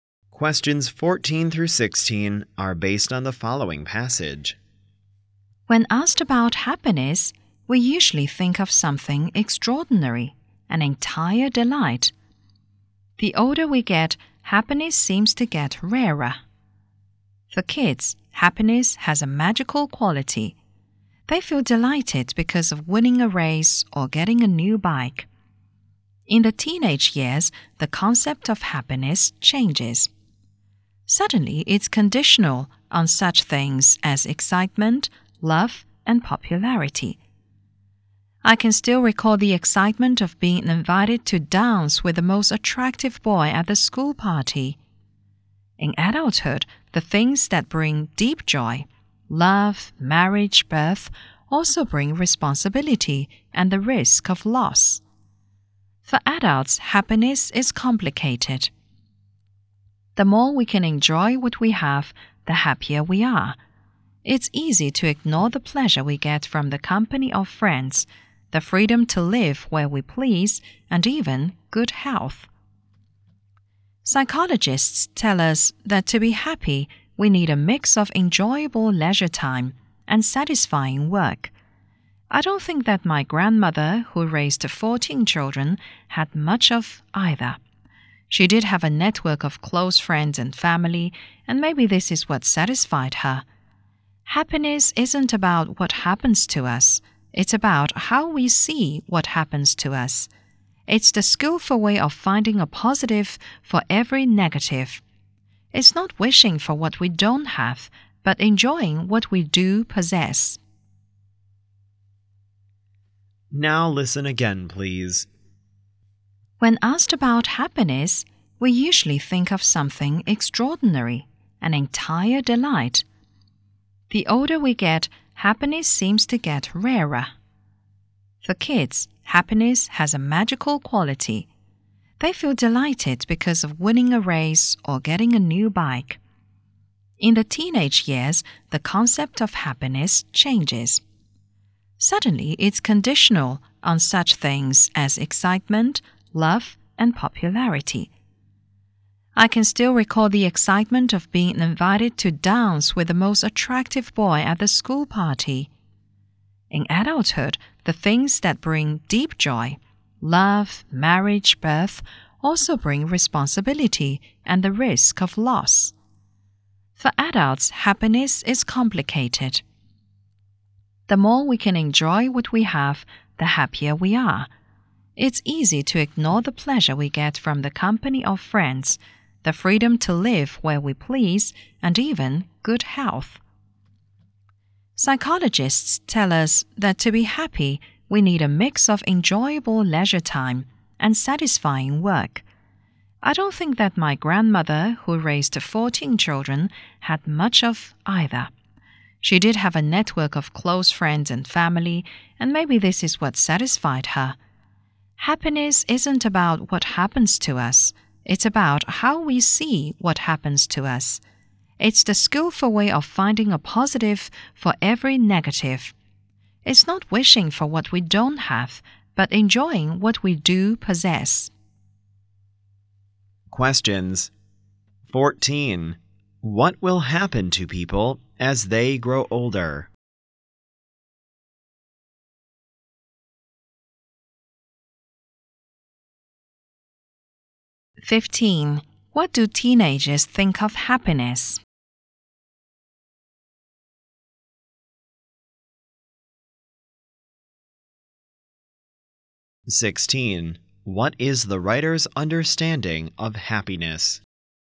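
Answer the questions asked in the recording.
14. Happiness seems to get rarer
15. It depends on excitement, love and popularity
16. It's about how we see what happens to us, enjoying what we have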